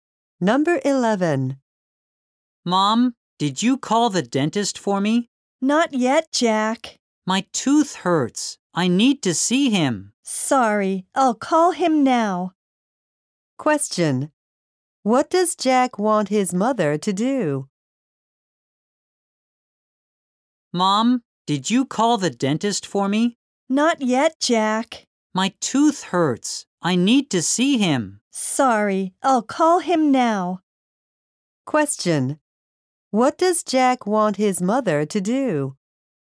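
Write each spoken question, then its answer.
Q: What does Jack want his mother to do?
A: Call the dentist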